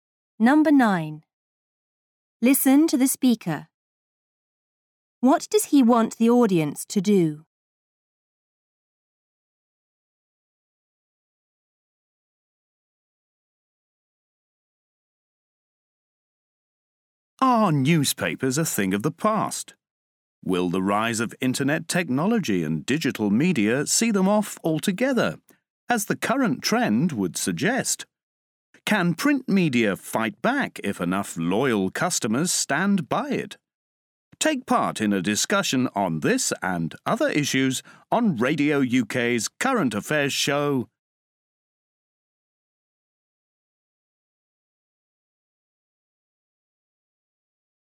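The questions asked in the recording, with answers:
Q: What does he want the audience to do?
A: Take part in a discussion on Radio UK's Current Affairs show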